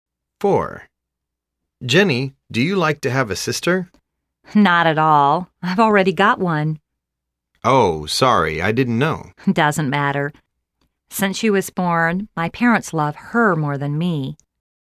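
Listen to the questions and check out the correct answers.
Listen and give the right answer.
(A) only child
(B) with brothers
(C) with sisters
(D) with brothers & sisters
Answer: (C) with sisters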